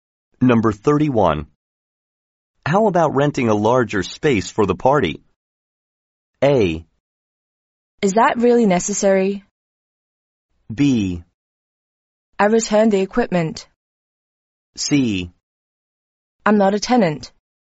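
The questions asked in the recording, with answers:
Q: How about renting a larger space for the party?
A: A: Is that really necessary?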